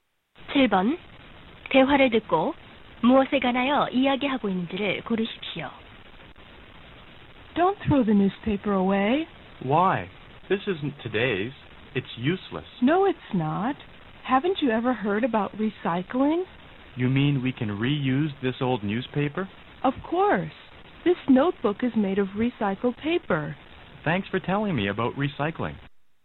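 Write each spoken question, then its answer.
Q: 7번 대화를 듣고 무엇에 관하여 이야기하고 있는지를 고르십시오.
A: 재활용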